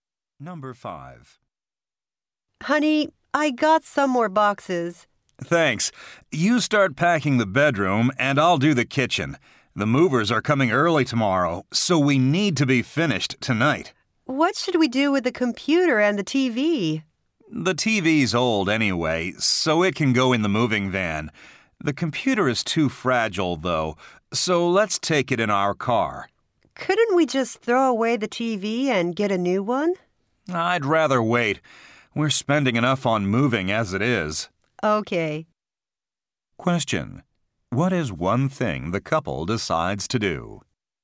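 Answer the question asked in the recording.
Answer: Take the computer in their car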